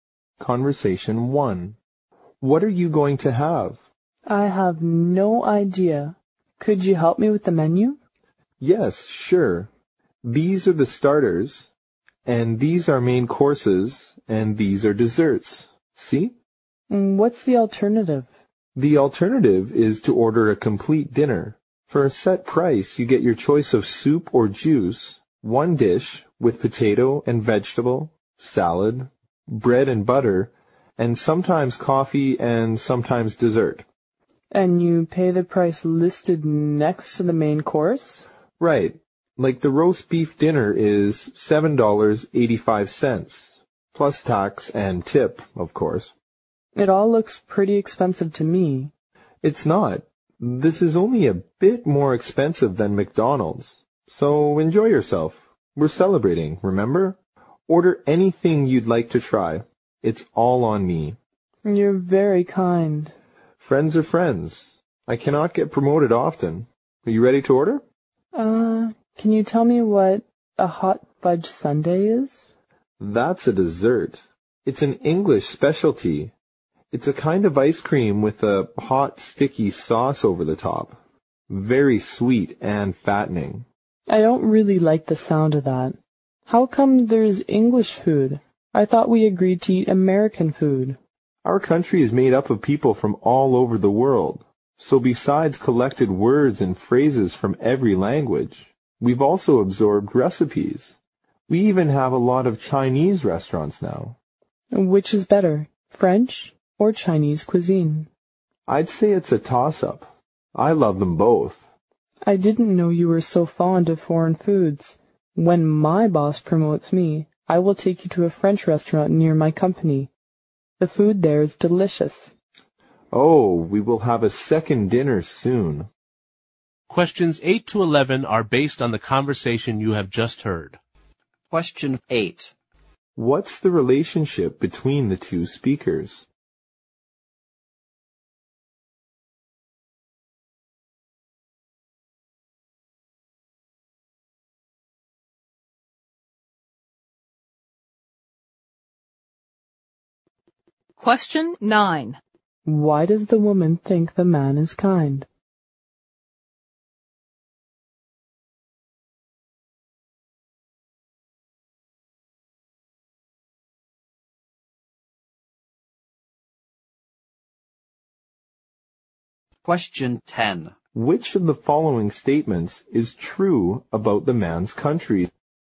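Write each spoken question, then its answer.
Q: What's the relationship between the 2 speakers?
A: Friends

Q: Why does the woman think the man is kind?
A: He is paying for the meal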